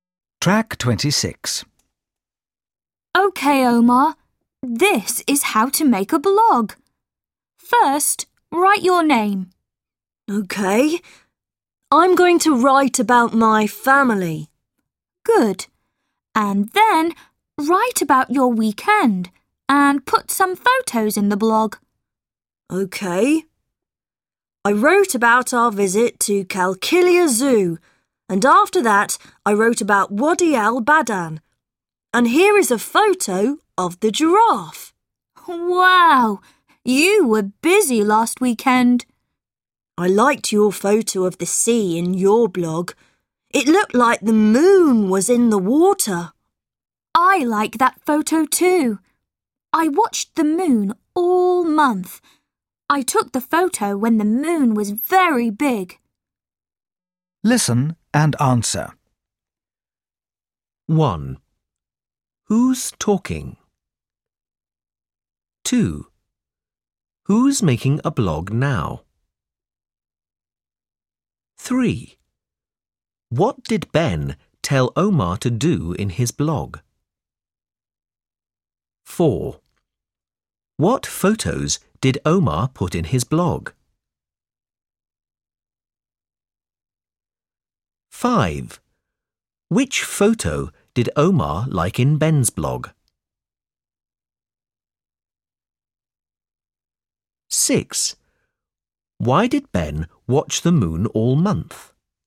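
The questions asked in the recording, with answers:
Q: Who's talking?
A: Ben and Omar

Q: Who's making a blog now?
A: Omar

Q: What did Ben tell Omar to do in his blog?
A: Write his name, write about his weekend and put photos in it

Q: What photos did Omar put in his blog?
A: A photo of the giraffe

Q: Which photo did Omar like in Ben's blog?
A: The photo of the sea and the moon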